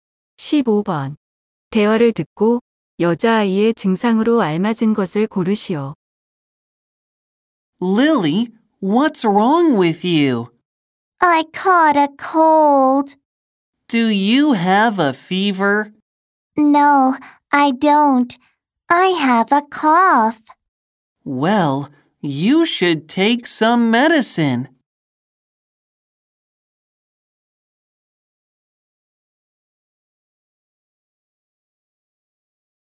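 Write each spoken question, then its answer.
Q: 대화를 듣고 여자아이의 증상으로 알맞은 것을 고르시오.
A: 기침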